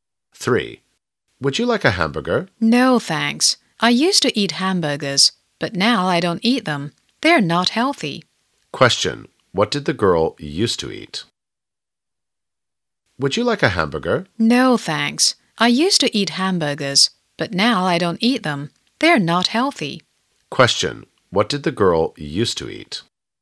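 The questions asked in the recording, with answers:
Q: What did the girl used to eat?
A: Hamburgers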